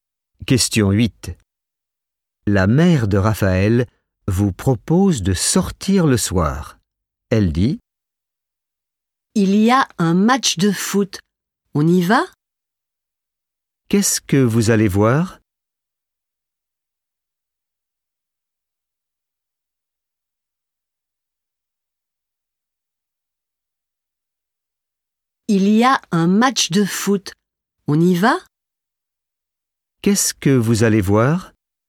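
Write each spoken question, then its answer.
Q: Qu'est-ce que vous allez voir?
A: un match de foot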